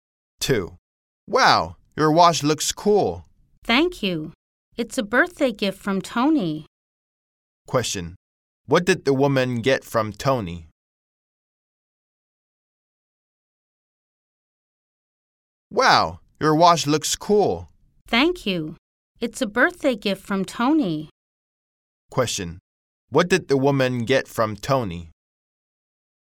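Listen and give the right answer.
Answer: A watch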